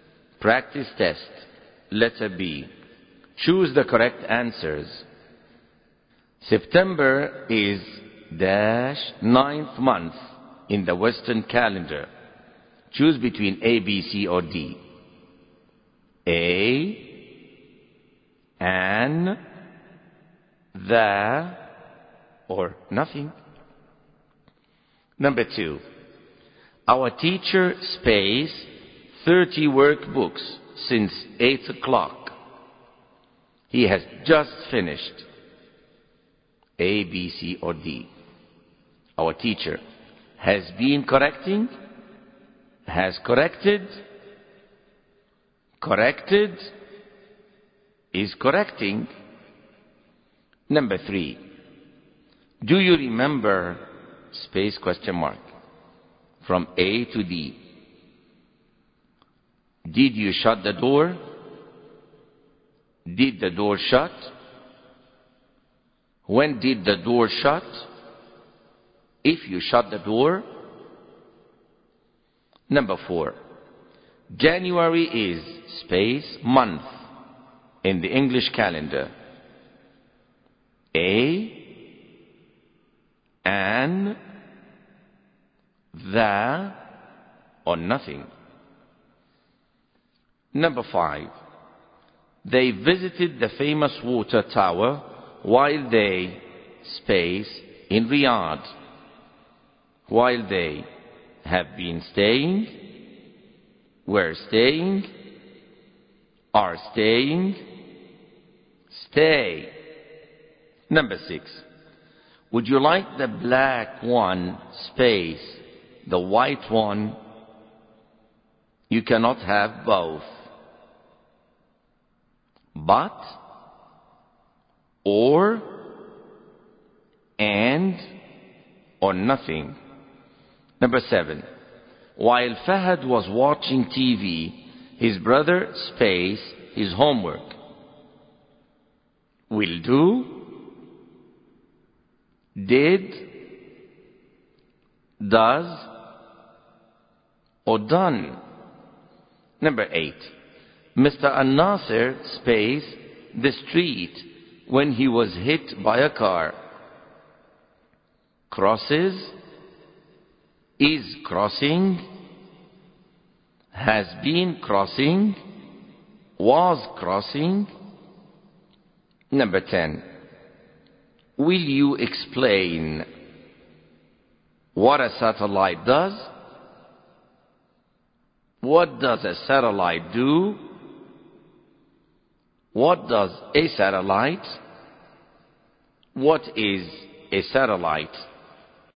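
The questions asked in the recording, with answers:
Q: September is dash ninth month in the Western calendar.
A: C: The

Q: January is space month in the English calendar.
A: C: The

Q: They visited the famous water tower while they space in Riyadh.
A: B: were staying

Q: Would you like the black one space?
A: B: or

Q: While Fahad was watching TV, his brother spaced his homework.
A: B: Did

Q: Mr. An-Nasir spaced the street when he was hit by a car.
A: D: Was crossing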